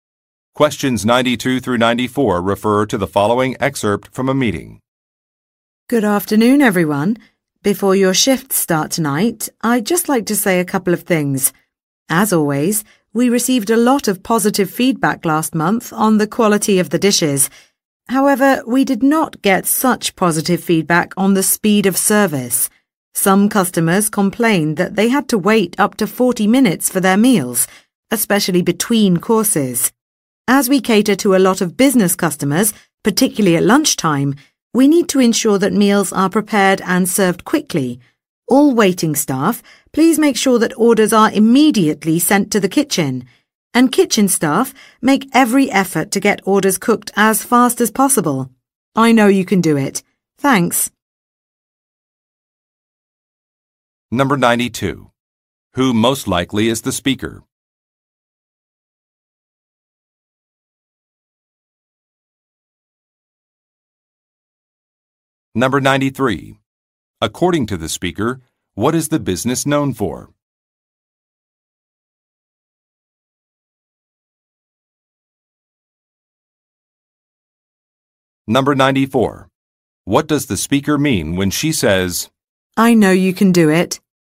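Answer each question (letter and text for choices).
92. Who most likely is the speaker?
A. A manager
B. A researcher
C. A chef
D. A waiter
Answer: A. A manager

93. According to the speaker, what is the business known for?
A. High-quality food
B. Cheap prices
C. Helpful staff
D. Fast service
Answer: A. High-quality food

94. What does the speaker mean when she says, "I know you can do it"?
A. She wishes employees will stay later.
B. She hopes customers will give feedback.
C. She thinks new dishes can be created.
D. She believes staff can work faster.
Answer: D. She believes staff can work faster.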